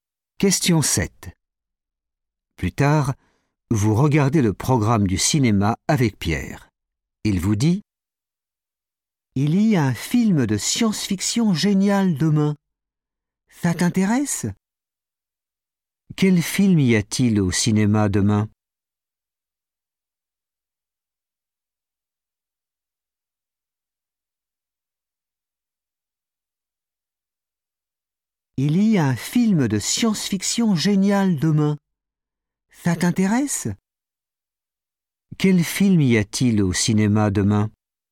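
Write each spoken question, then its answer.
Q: Quel film y a-t-il au cinéma demain ?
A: un film de science-fiction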